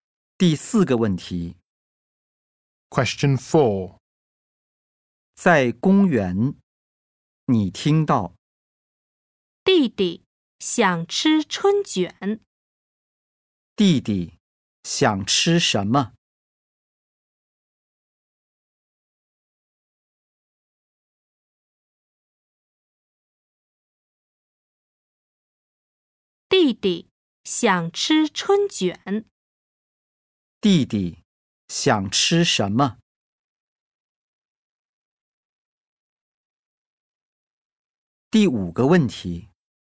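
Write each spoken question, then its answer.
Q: 弟弟想吃什么?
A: 春卷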